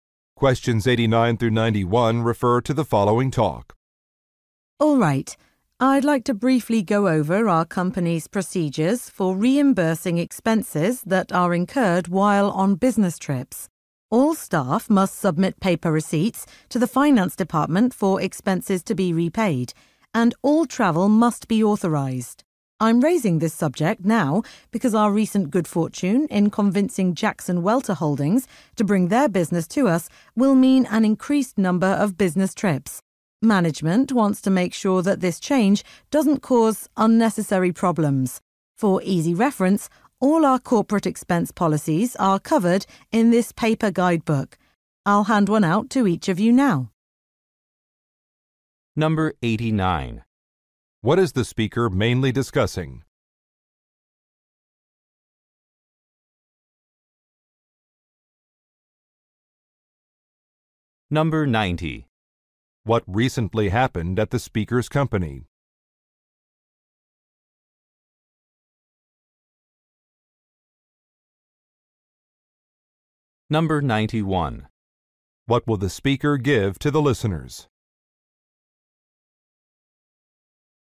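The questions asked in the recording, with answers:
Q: What is the speaker mainly discussing?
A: Procedures for reimbursing business travel expenses

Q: What recently happened at the speaker's company?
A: It gained a new client, Jackson Welter Holdings

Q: What will the speaker give to the listeners?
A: A paper guidebook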